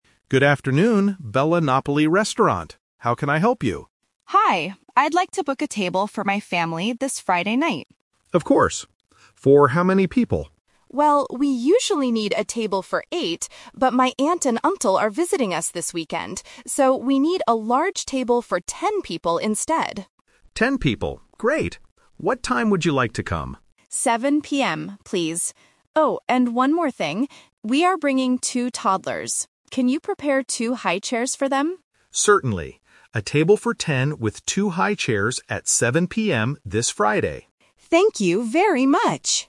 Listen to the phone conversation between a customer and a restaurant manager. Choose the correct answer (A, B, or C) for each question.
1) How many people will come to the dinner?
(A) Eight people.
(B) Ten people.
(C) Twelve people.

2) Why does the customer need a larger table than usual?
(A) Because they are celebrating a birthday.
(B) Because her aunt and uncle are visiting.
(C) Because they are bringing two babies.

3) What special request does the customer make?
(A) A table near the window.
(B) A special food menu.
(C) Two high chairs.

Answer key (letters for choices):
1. B
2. B
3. C

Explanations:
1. This is "The Twist". The customer says, "we usually need a table for eight" (Option A - the trap), but because her relatives are visiting, she says, "we need a large table for ten people instead." Option (C) is a plausible distractor if students incorrectly add the two toddlers to the ten people.
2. The customer clearly states the reason for the bigger table: "but my aunt and uncle are visiting us this weekend." Option (C) is a trap because they are bringing toddlers, but the toddlers are the reason for the high chairs, not the main reason the table size changed from eight to ten. Option (A) is not mentioned.
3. The customer asks, "Can you prepare two high chairs for them?" Options (A) and (B) are plausible things people ask for when booking a table, but they are not mentioned in the audio.